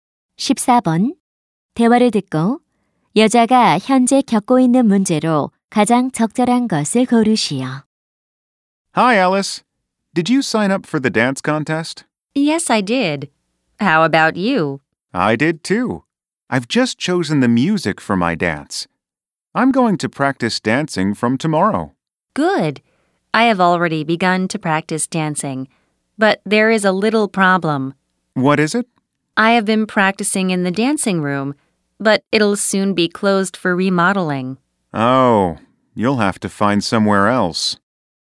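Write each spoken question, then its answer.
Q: 대화를 듣고 여자가 현재 겪고 있는 문제로 가장 적절한 것을 고르시오.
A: 연습실이 리모델링으로 곧 문을 닫아 연습할 장소가 필요함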